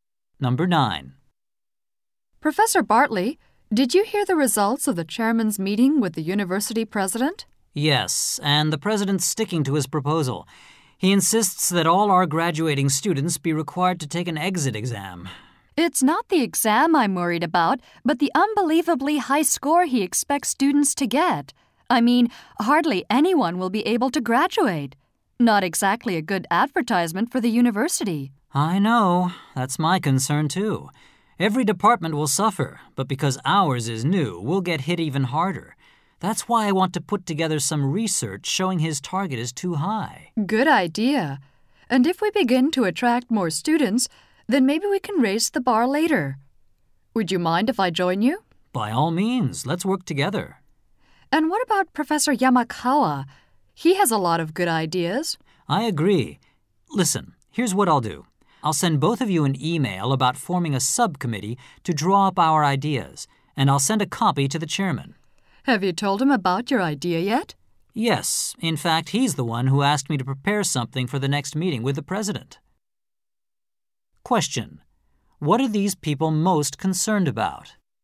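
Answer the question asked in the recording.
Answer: The president's exit exam target score is too high, so few students will graduate.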